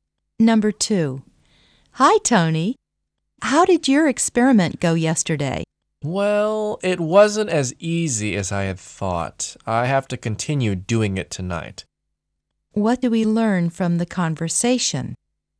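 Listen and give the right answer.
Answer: Tony hasn't finished his experiment; it was harder than he expected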